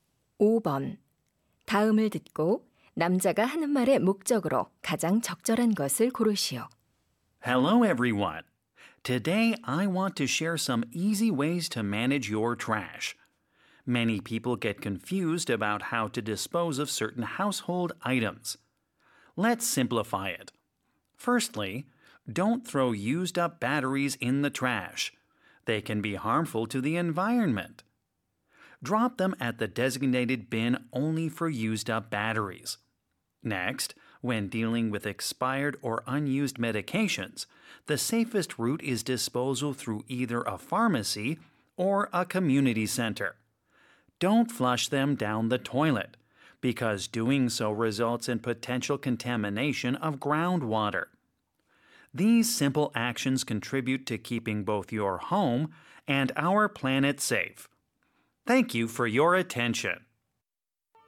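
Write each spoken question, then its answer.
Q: 다음을 듣고 남자가 하는 말의 목적으로 가장 적절한 것을 고르시오.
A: 폐건전지와 폐의약품 등 생활 쓰레기의 올바른 처리 방법을 알려 주려고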